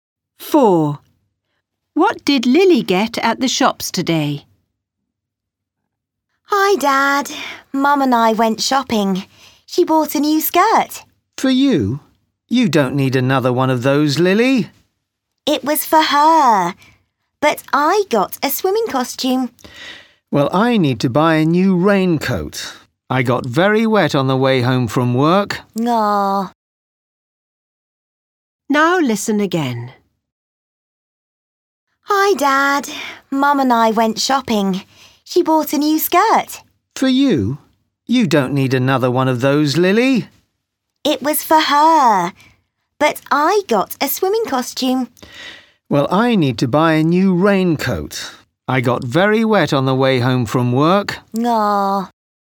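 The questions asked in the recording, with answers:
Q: What did Lily get at the shops today?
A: A swimming costume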